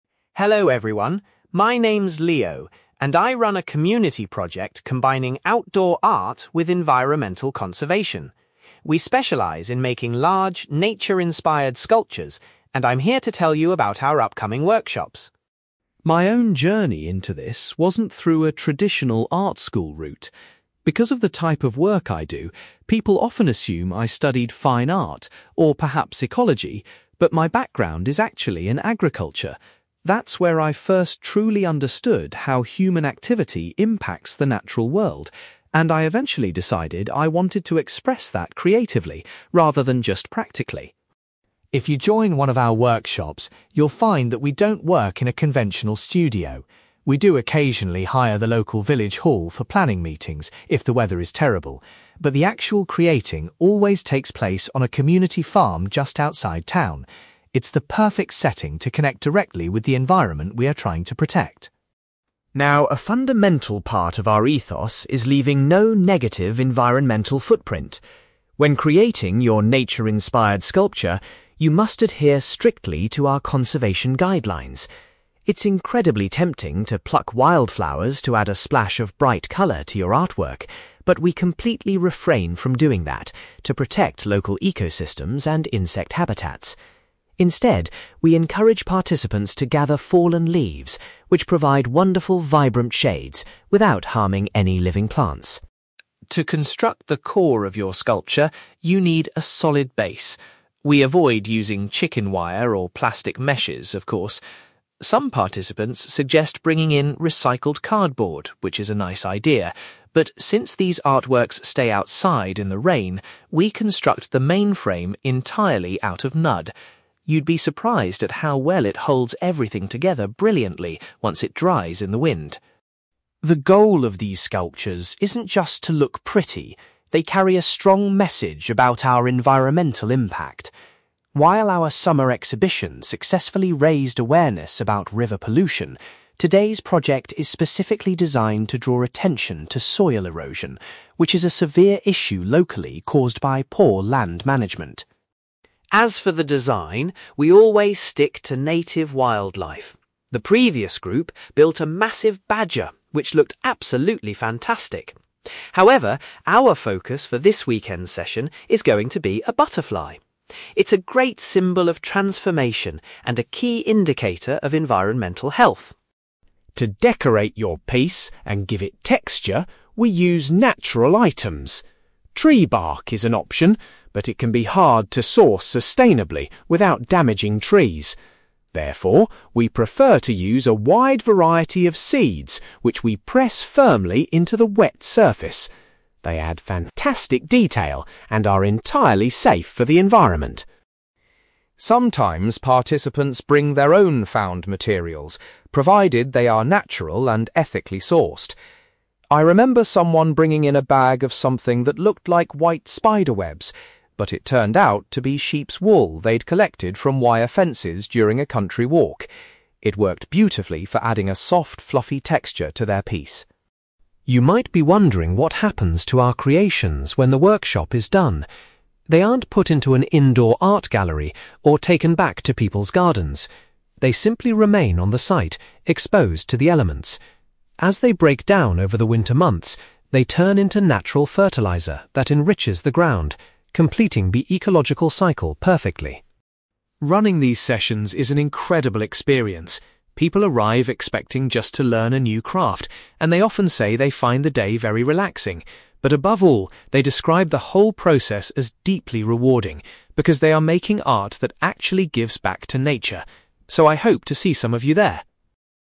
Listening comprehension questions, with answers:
You will hear a man called Leo giving a presentation about a community project where participants create nature-inspired sculptures. For questions 9-18, complete the sentences with a word or short phrase.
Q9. Leo says that before becoming an artist, his previous experience was in the field of (9)........................... .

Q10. Leo explains that the practical work for the workshop is hosted at a (10)........................... rather than an indoor studio.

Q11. To respect environmental guidelines, participants are asked to use (11)........................... instead of picking wildflowers for colour.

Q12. Leo notes that the structural base of the sculptures is made of (12)........................... because the artworks are kept outdoors.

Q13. The aim of the current artistic project is to highlight the problem of (13)........................... in the local area.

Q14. Leo announces that the subject for the upcoming workshop will be a (14)........................... .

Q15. Leo prefers participants to utilise (15)........................... to create interesting textures on the surface of their sculptures.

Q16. Leo was impressed when a past participant used (16)........................... found on fences to add a soft texture.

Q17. Once the sculptures decompose, they act as a natural (17)........................... for the earth.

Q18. While many people find the workshop relaxing, the most common word used to describe the experience is (18)........................... .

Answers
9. agriculture
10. farm
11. fallen leaves
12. mud
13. soil erosion
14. butterfly
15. seeds
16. sheep's wool
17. fertiliser
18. rewarding

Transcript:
Leo: Hello everyone. My name's Leo, and I run a community project combining outdoor art with environmental conservation. We specialise in making large, nature-inspired sculptures, and I'm here to tell you about our upcoming workshops.
My own journey into this wasn't through a traditional art school route. Because of the type of work I do, people often assume I studied fine art, or perhaps ecology, but my background is actually in agriculture. That's where I first truly understood how human activity impacts the natural world, and I eventually decided I wanted to express that creatively rather than just practically.
If you join one of our workshops, you'll find that we don't work in a conventional studio. We do occasionally hire the local village hall for planning meetings if the weather is terrible, but the actual creating always takes place on a community farm just outside town. It's the perfect setting to connect directly with the environment we are trying to protect.
Now, a fundamental part of our ethos is leaving no negative environmental footprint. When creating your nature-inspired sculpture, you must adhere strictly to our conservation guidelines. It's incredibly tempting to pluck wildflowers to add a splash of bright colour to your artwork, but we completely refrain from doing that to protect local ecosystems and insect habitats. Instead, we encourage participants to gather fallen leaves, which provide wonderful vibrant shades without harming any living plants.
To construct the core of your sculpture, you need a solid base. We avoid using chicken wire or plastic meshes, of course. Some participants suggest bringing in recycled cardboard, which is a nice idea, but since these artworks stay outside in the rain, we construct the main frame entirely out of mud. You'd be surprised at how well it holds everything together brilliantly once it dries in the wind.
The goal of these sculptures isn't just to look pretty; they carry a strong message about our environmental impact. While our summer exhibition successfully raised awareness about river pollution, today's project is specifically designed to draw attention to soil erosion, which is a severe issue locally caused by poor land management.
As for the design, we always stick to native wildlife. The previous group built a massive badger, which looked absolutely fantastic. However, our focus for this weekend's session is going to be a butterfly. It's a great symbol of transformation and a key indicator of environmental health.
To decorate your piece and give it texture, we use natural items. Tree bark is an option, but it can be hard to source sustainably without damaging trees. Therefore, we prefer to use a wide variety of seeds which we press firmly into the wet surface. They add fantastic detail and are entirely safe for the environment.
Sometimes participants bring their own found materials, provided they are natural and ethically sourced. I remember someone bringing in a bag of something that looked like white spider webs, but it turned out to be sheep's wool they'd collected from wire fences during a country walk. It worked beautifully for adding a soft, fluffy texture to their piece!
You might be wondering what happens to our creations when the workshop is done. They aren't put into an indoor art gallery or taken back to people's gardens. They simply remain on the site, exposed to the elements. As they break down over the winter months, they turn into natural fertiliser that enriches the ground, completing the ecological cycle perfectly.
Running these sessions is an incredible experience. People arrive expecting just to learn a new craft, and they often say they find the day very relaxing. But above all, they describe the whole process as deeply rewarding, because they are making art that actually gives back to nature. So, I hope to see some of you there!

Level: B2